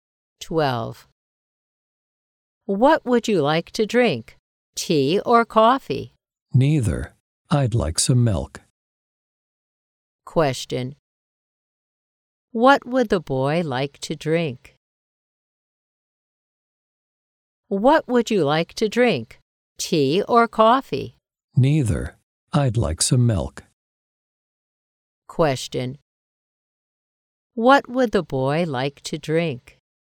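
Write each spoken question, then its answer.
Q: What would the boy like to drink?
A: Milk.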